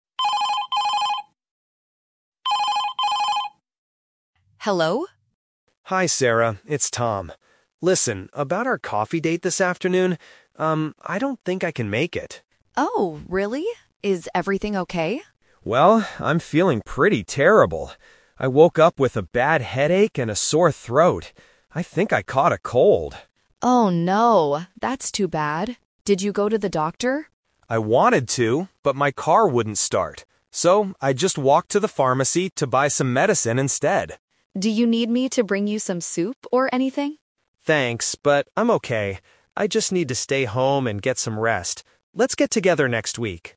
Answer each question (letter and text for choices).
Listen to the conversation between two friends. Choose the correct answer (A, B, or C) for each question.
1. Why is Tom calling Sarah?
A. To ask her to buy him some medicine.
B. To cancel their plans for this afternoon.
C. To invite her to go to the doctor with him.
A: B. To cancel their plans for this afternoon.

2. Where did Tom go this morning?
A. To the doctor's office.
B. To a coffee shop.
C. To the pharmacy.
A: C. To the pharmacy.

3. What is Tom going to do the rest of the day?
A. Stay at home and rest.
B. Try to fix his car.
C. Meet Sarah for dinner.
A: A. Stay at home and rest.

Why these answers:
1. Tom says, "about our coffee date this afternoon... I don't think I can make it." This means he is canceling the plan. Trap A is wrong: Sarah offers to bring him something, but Tom says "Thanks, but I'm okay." Trap C is wrong: Tom does not invite her to the doctor.
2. Tom clearly states, "I just walked to the pharmacy to buy some medicine instead." Trap A is wrong (The Twist): Tom says "I wanted to [go to the doctor], but my car wouldn't start." He thought about it, but didn't go. Trap B is wrong: A coffee shop is where they planned to go in the afternoon, not where he went this morning.
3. At the end of the conversation, Tom says, "I just need to stay home and get some rest." Trap B is wrong: Tom mentions his car wouldn't start, but he never says he is going to fix it today. Trap C is wrong: He wants to meet Sarah "next week," not for dinner today.

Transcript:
Sarah: Hello?
Tom: Hi, Sarah. It's Tom. Listen, about our coffee date this afternoon... um, I don't think I can make it.
Sarah: Oh, really? Is everything okay?
Tom: Well, I'm feeling pretty terrible. I woke up with a bad headache and a sore throat. I think I caught a cold.
Sarah: Oh, no! That's too bad. Did you go to the doctor?
Tom: I wanted to, but my car wouldn't start. So, I just walked to the pharmacy to buy some medicine instead.
Sarah: Do you need me to bring you some soup or anything?
Tom: Thanks, but I'm okay. I just need to stay home and get some rest. Let's get together next week.